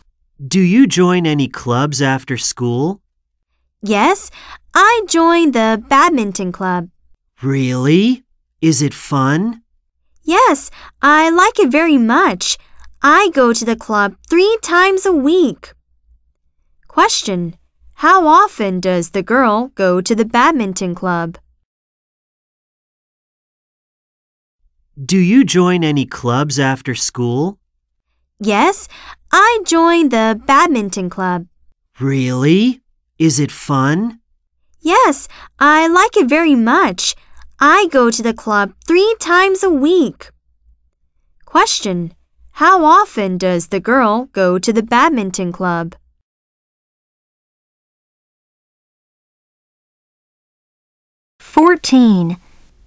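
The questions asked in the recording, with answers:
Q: How often does the girl go to the badminton club?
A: Three times a week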